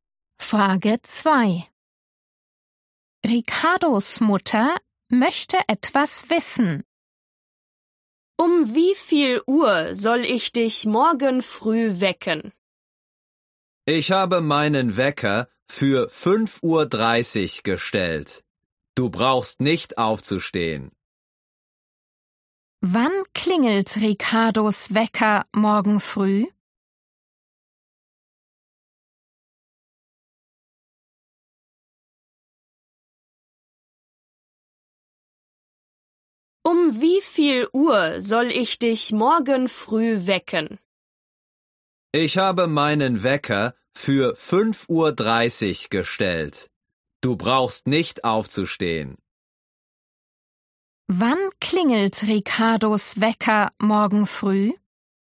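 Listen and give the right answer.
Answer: um 5.30 Uhr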